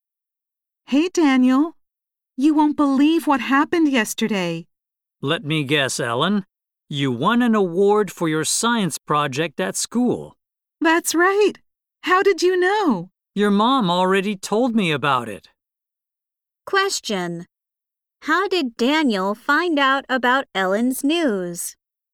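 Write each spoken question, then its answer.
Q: How did Daniel find out about Ellen's news?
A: Ellen's mother told him.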